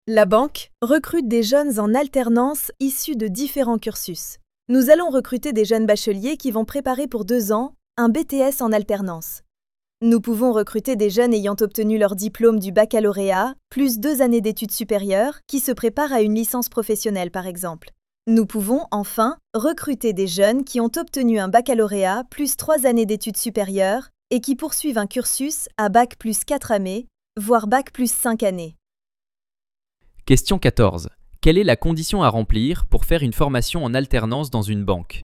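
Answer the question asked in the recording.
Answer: Avoir au moins le baccalauréat et préparer un diplôme en alternance (BTS, licence ou bac+4/5).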